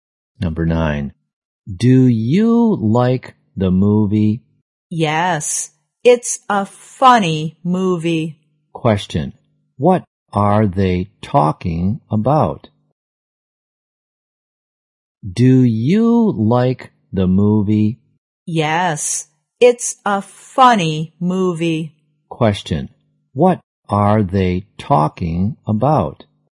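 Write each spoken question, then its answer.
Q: Question. What are they talking about?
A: A movie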